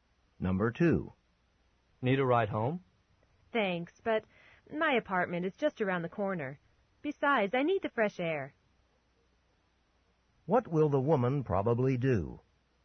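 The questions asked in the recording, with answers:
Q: What will the woman probably do?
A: Walk home.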